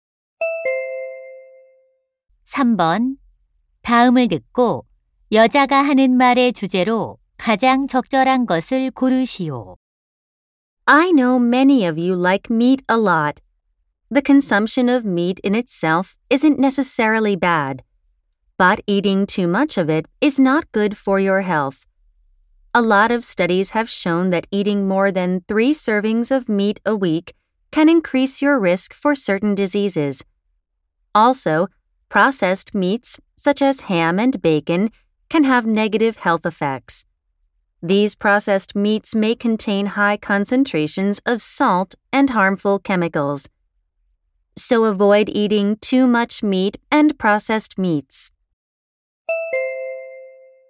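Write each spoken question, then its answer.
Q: 다음을 듣고 여자가 하는 말의 주제로 가장 적절한 것을 고르시오.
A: 고기와 가공육을 지나치게 먹는 것의 건강상 위험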